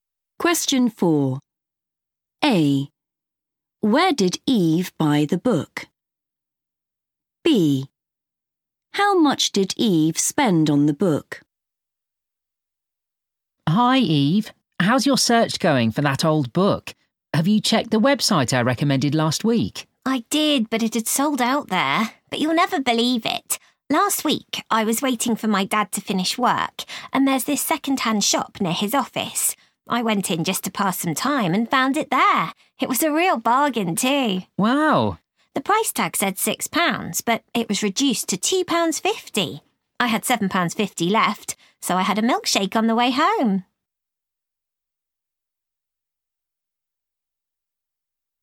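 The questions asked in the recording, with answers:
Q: Where did Eve buy the book?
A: a second-hand shop

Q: How much did Eve spend on the book?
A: £2.50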